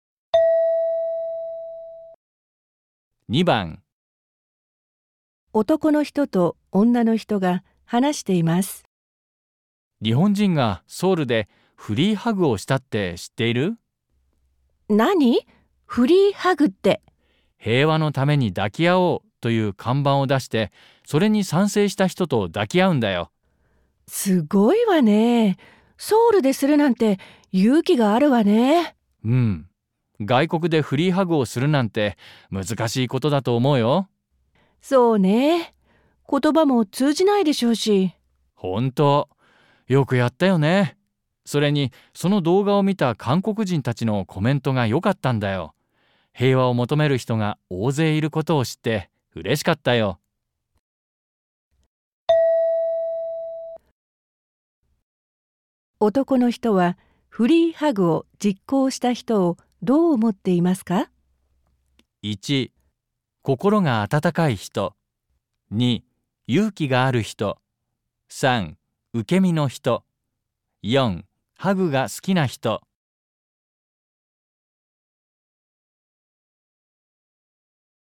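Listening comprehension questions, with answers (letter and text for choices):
問題3では、問題用紙に何もいんさつされていません。この問題は、全体としてどんな内容かを聞く問題です。話の前に質問はありません。まず話を聞いてください。それから、質問とせんたくしを聞いて、1から4の中から、最もよいものを一つ選んでください。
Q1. 男の人は「フリーハグ」を実行した人をどう思っていますか。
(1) 心が温かい人/Người có trái tim ấm áp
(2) 勇気がある人/ Người dũng cảm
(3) 受け身の人/ Người bị động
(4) ハグが好きな人/ Người thích ôm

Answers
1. (2) 勇気がある人/ Người dũng cảm

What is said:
M:うん、外国でフリーハグをするなんて難しいことだと思うよ。/Uhm, tớ nghĩ là free hugs ở nước ngoài sẽ khó.
F:そうね。言葉も通じないでしょうし。/Đúng vậy. Vì chắc cũng không hiểu tiếng của nhau.
M:本当。よくやったよね。それにその動画を見た韓国人たちのコメントがよかったんだよ。平和を求める人が大勢いることを知って嬉しかったよ。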